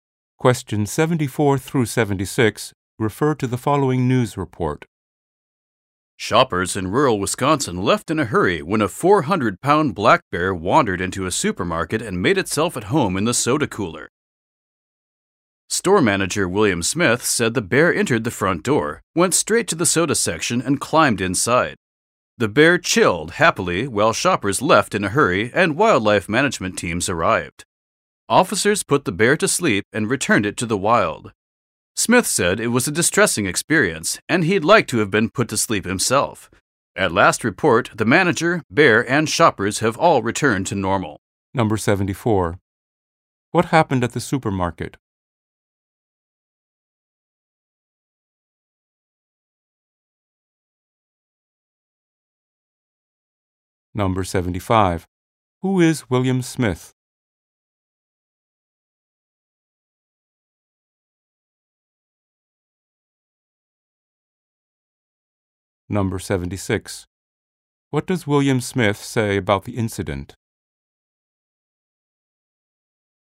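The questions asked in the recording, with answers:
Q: What happened at the supermarket?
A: A black bear wandered in and climbed into the soda cooler

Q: Who is William Smith?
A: The store manager

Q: What does William Smith say about the incident?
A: It was distressing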